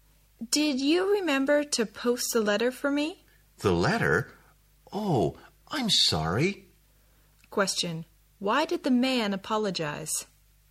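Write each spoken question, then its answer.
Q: Why did the man apologize?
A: He forgot to post the letter.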